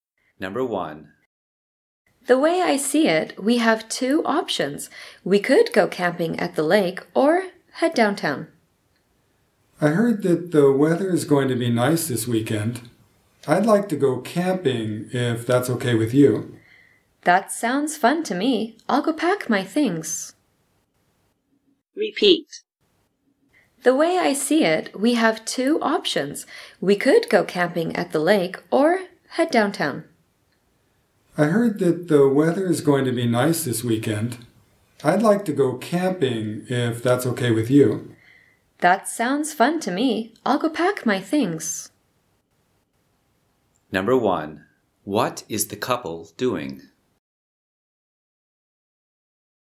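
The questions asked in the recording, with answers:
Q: What is the couple doing?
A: Deciding what to do this weekend; they choose to go camping at the lake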